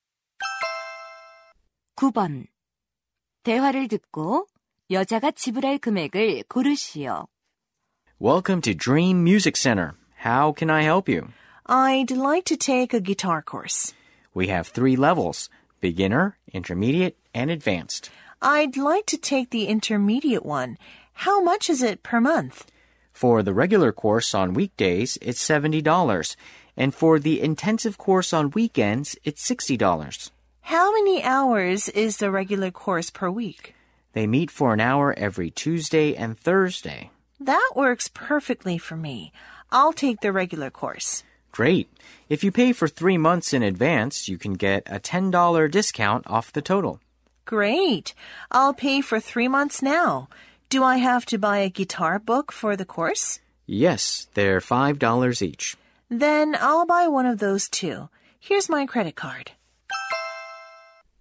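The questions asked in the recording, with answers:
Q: 대화를 듣고 여자가 지불할 금액을 고르시오.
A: $205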